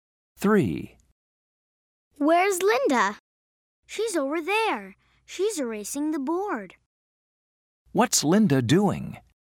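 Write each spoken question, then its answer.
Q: What's Linda doing?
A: She's erasing the board.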